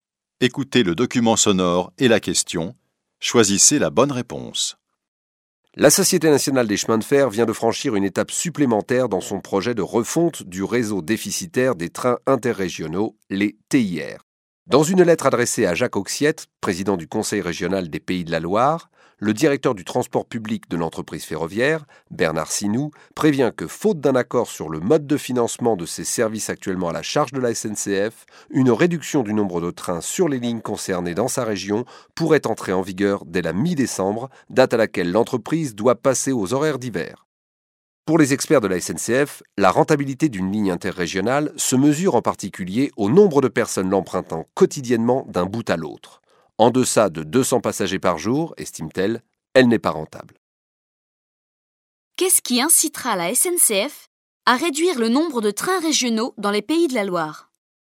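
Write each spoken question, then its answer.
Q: Qu'est-ce qui incitera la SNCF à réduire le nombre de trains régionaux dans les Pays de la Loire ?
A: L'absence d'accord sur le mode de financement de ces services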